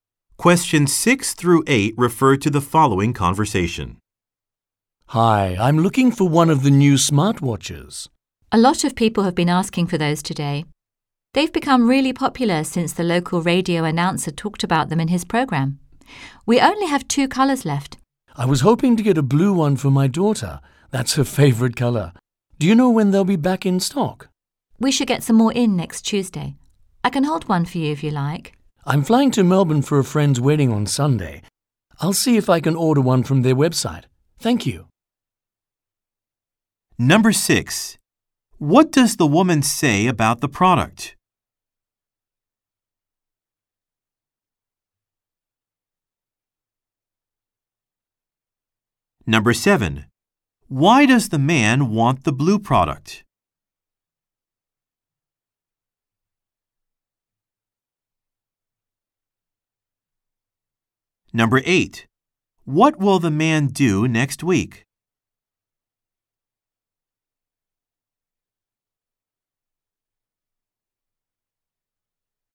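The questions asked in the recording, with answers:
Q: What does the woman say about the product?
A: It has become popular since a radio announcer talked about it.

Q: Why does the man want the blue product?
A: Blue is his daughter's favorite color.

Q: What will the man do next week?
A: Fly to Melbourne for a friend's wedding.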